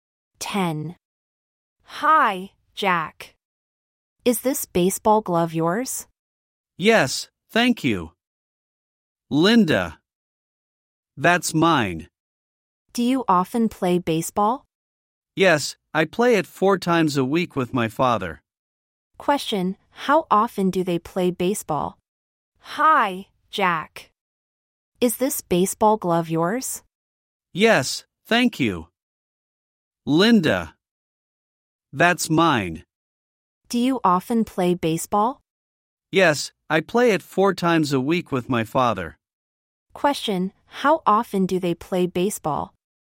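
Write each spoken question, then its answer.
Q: Question, how often do they play baseball?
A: Four times a week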